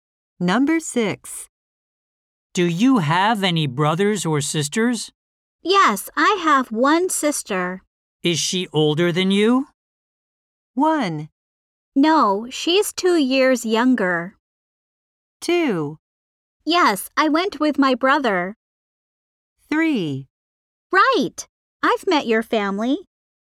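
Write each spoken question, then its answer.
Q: Is she older than you?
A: 1: No, she's 2 years younger.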